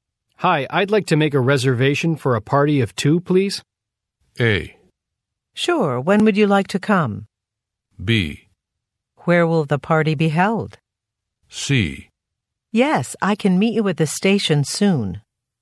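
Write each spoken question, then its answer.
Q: Hi, I'd like to make a reservation for a party of 2, please.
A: A: Sure, when would you like to come?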